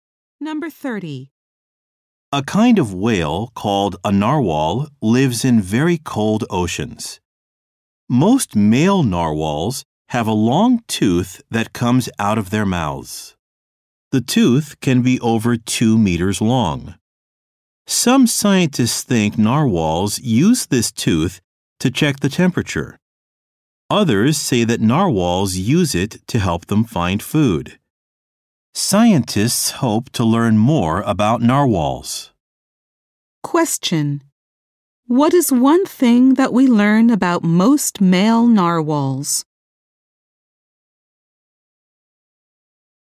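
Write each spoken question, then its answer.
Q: What is one thing that we learn about most male narwhals?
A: They have a long tooth coming out of their mouths.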